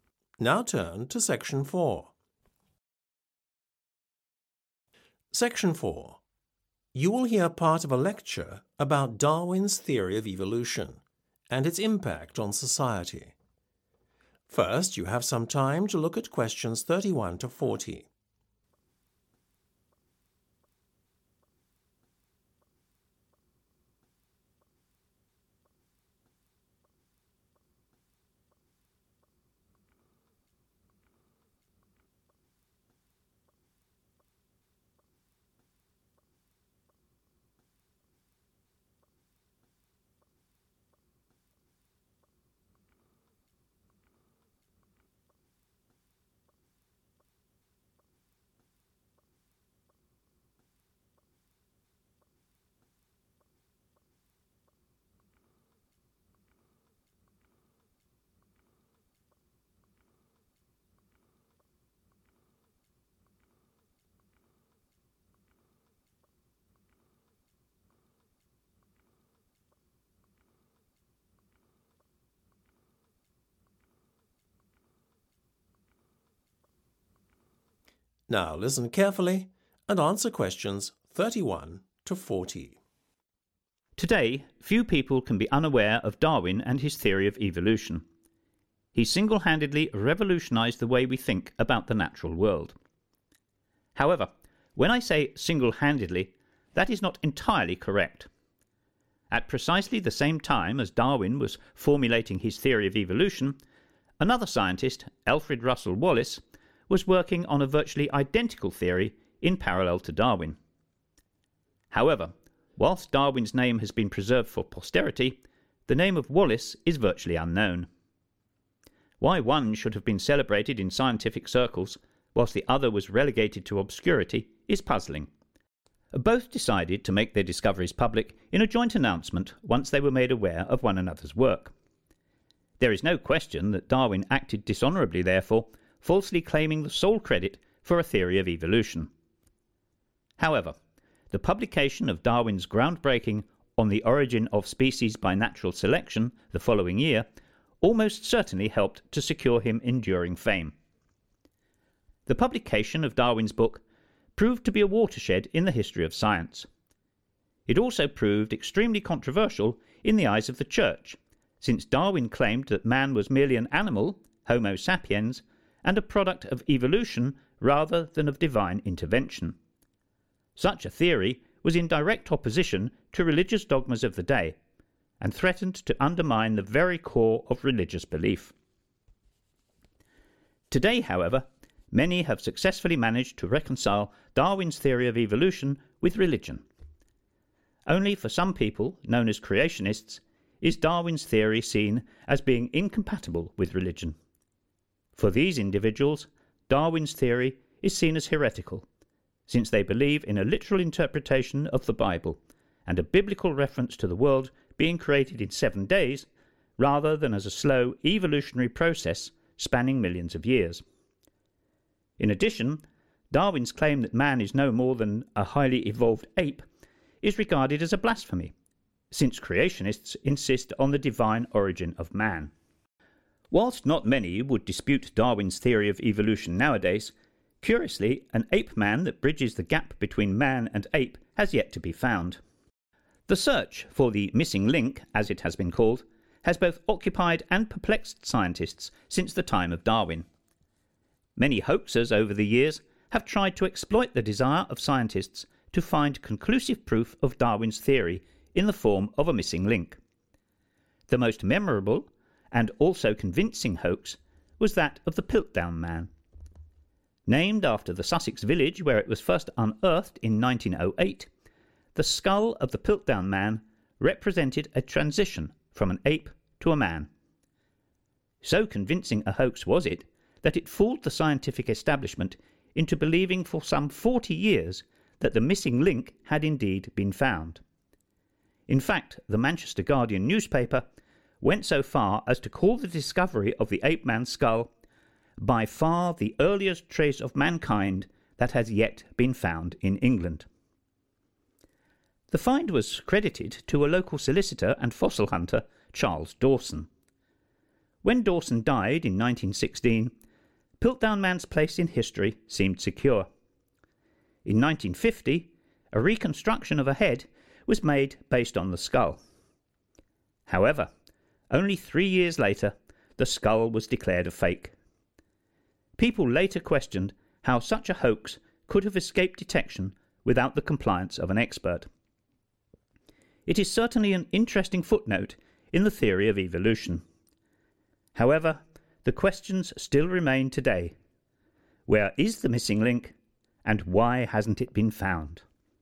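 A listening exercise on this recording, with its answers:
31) Darwin is credited with having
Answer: revolutionised

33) to Darwin. Unfortunately for Wallace, Darwin seems to have been given the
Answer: sole credit

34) for the theory of evolution. Darwin's theory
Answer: proved extremely controversial

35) , upsetting the religious authorities of his time. Today, it is often accepted that Man is a product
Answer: of evolution

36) The absence of a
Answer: missing link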